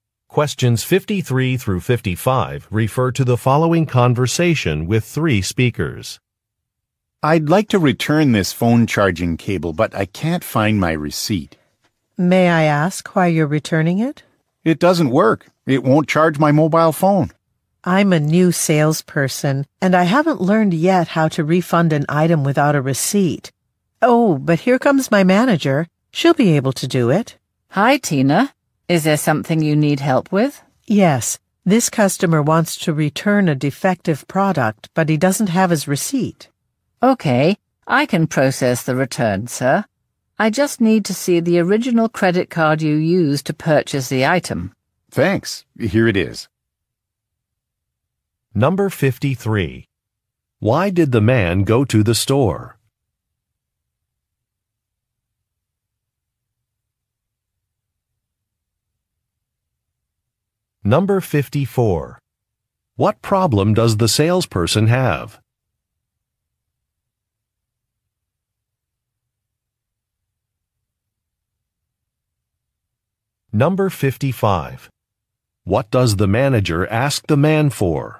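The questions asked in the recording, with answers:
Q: Why did the man go to the store?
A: To return a phone charging cable that doesn't work

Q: What problem does the salesperson have?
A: She hasn't learned how to refund an item without a receipt

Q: What does the manager ask the man for?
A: The original credit card he used to buy the item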